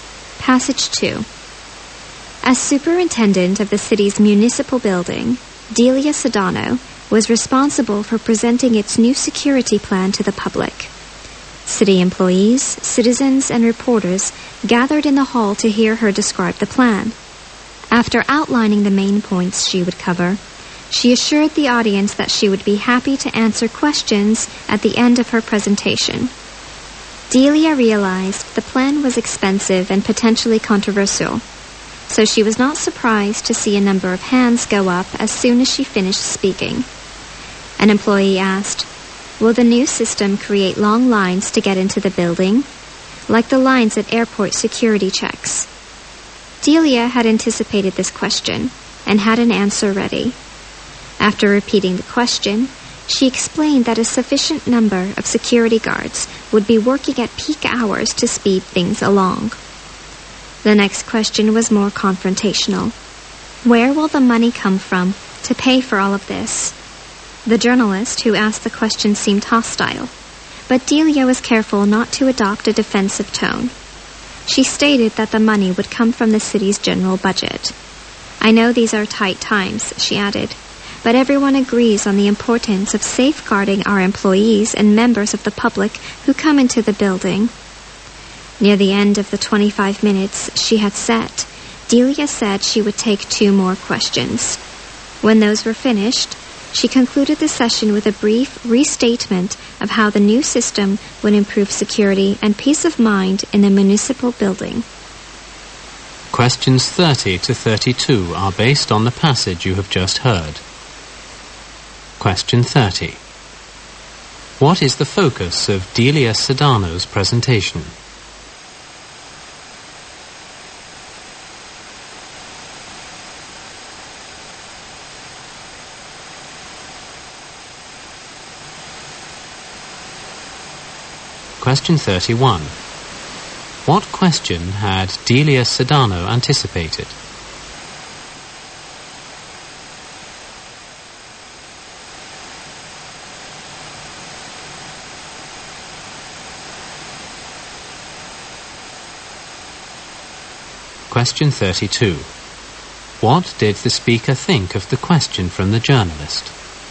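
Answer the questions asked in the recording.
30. The new security plan for the municipal building.
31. Whether the new system would create long lines to get into the building.
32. It was confrontational.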